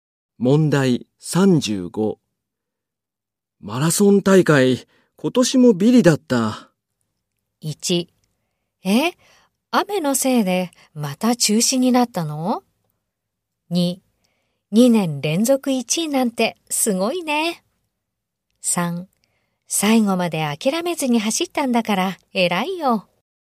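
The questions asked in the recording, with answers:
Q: マラソン大会、今年もビリだった。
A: 3: 最後まで諦めずに走ったんだから偉いよ。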